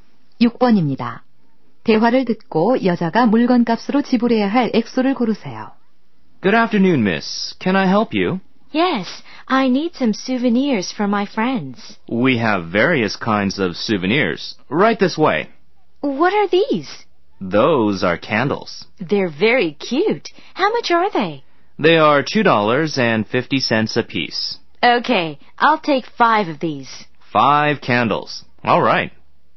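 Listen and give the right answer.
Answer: 12.50달러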